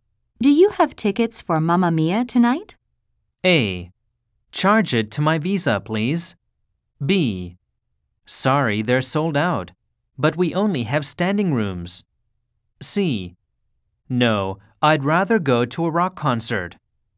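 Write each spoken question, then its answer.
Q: Do you have tickets for Mamma Mia tonight?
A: B: Sorry, they're sold out, but we only have standing rooms.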